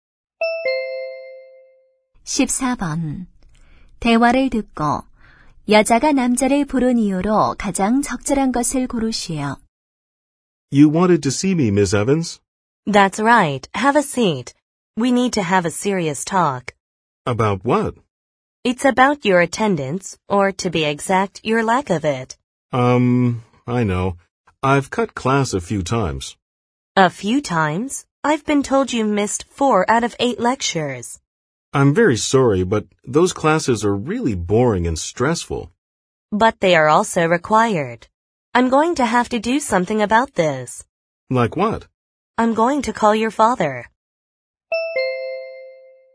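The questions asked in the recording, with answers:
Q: 대화를 듣고 여자가 남자를 부른 이유로 가장 적절한 것을 고르시오.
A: 수업 출석 문제(결석)를 이야기하려고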